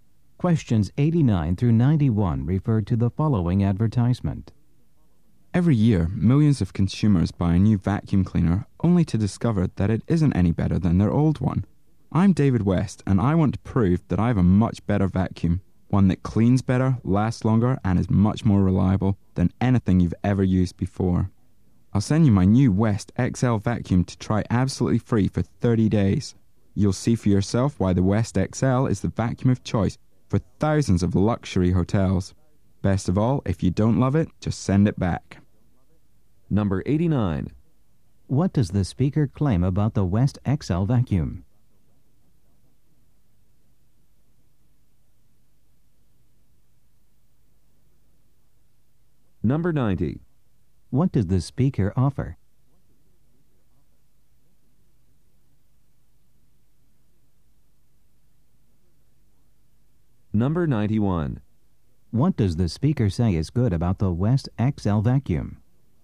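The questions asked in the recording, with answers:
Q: What does the speaker claim about the West XL vacuum?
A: It cleans better, lasts longer and is more reliable

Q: What does the speaker offer?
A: A free 30-day trial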